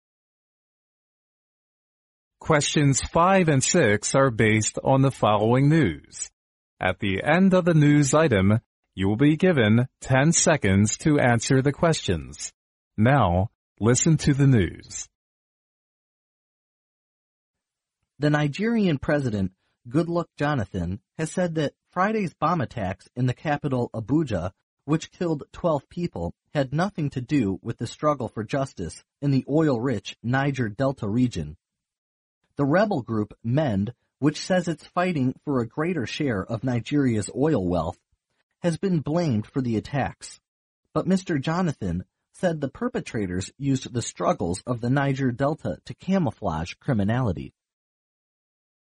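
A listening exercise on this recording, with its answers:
Now listen to the news.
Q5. How many people were killed during the Friday's bomb attacks according to the news item?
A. 9.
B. 12.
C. 2.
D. 4.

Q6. Who has been blamed for the Friday's bomb attacks?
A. The rebel group, Goodluck.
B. The Nigerian government.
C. The rebel group,Mend.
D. The Niger Delta Wealth Group.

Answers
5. B. 12.
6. C. The rebel group,Mend.

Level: 英语四级

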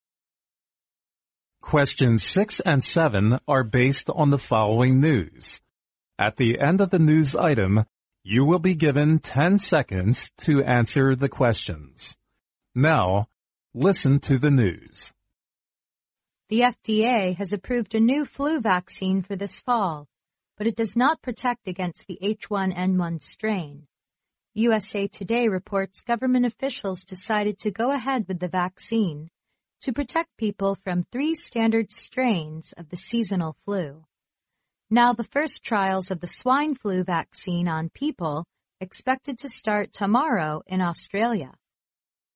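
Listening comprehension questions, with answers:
Now listen to the news.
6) Which of the following is NOT mentioned in the news item?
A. The new flu vaccine, the FDA has approved, does not protect against the H1N1.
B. The new flu vaccine protects against 3 standard types of seasonal flu.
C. 3 people were killed because of the swine flu in the US.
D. USA Today reports government officials decided to go ahead with the vaccine.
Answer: C. 3 people were killed because of the swine flu in the US.

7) The first trials of H1N1 vaccine on people expected to start in_____.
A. Austria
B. the US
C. FDA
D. Australia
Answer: D. Australia

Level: 英语四级

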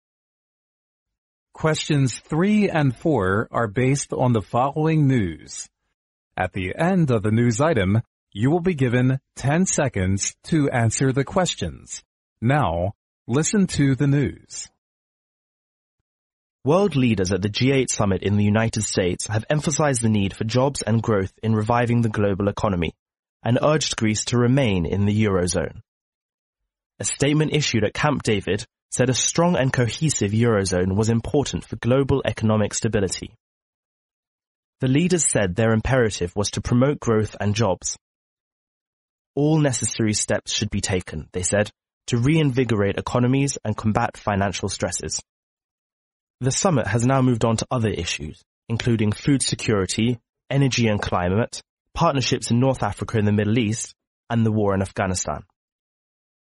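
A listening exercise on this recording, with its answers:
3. According to the news item,where does the G8 summit hold?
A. In Greece.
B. In America.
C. In Eurozone.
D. In North Africa.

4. What is the priority issue at the G8 summit?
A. Food security.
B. Climate change.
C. The war in Afghanistan.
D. Global economy recovery.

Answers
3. B. In America.
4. D. Global economy recovery.

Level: 英语四级

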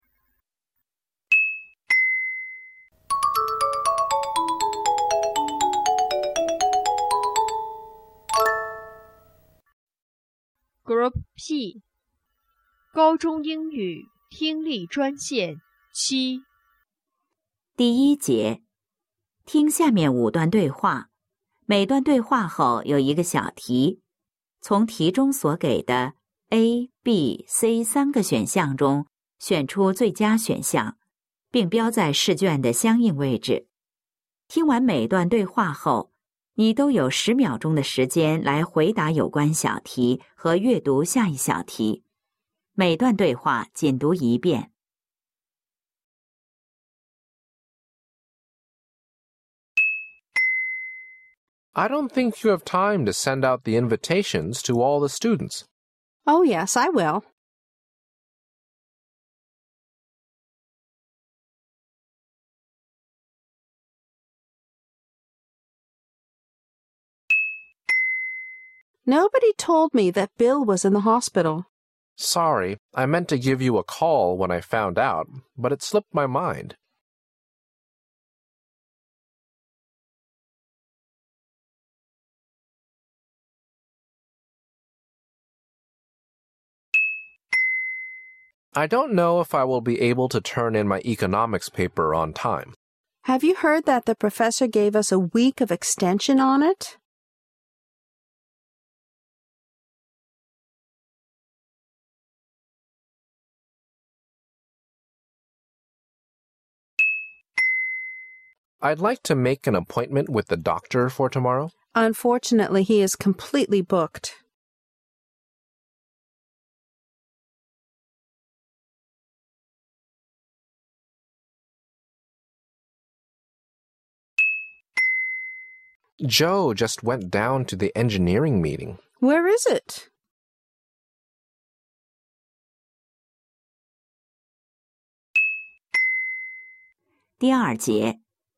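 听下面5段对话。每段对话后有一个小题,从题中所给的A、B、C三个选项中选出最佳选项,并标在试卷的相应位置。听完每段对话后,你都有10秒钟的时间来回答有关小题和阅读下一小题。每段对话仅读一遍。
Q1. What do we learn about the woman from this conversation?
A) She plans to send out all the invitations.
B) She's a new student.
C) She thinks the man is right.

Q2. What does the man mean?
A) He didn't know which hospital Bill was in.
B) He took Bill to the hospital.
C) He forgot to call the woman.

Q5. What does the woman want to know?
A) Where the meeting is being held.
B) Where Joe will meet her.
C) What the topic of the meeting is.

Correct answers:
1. A) She plans to send out all the invitations.
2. C) He forgot to call the woman.
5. A) Where the meeting is being held.

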